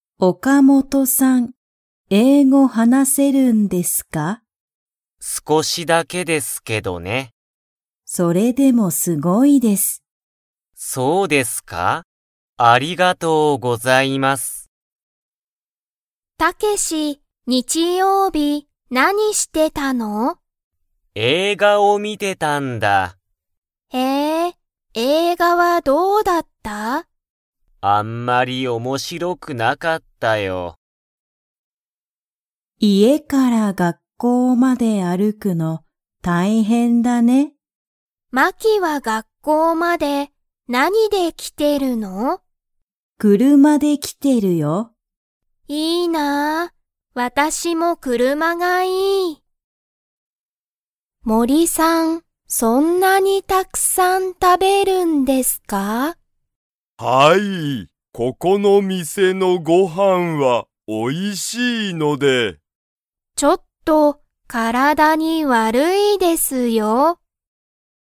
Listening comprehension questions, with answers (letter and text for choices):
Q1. 岡本(おかもと)さんは、____を話(はな)せる。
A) 英語えいご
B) 日本語(にほんご)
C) フランス語(ご)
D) イタリア語(ご)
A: A) 英語えいご

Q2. 映画(えいが)は面白(おもしろ)かったですか?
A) はい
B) いいえ)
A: B) いいえ)

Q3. マキは学校(がっこう)まで歩(ある)いて来(き)ていますか?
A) はい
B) いいえ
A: B) いいえ

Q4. ここの店(みせ)のご飯(はん)は____。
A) おいしい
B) かわいい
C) すごい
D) 面白(おもしろ)い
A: A) おいしい

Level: Level 1